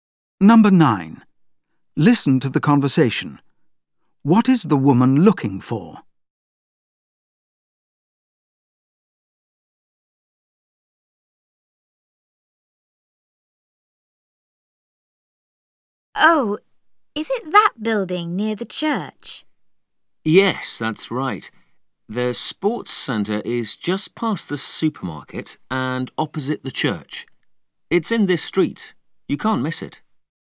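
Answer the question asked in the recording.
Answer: The sports centre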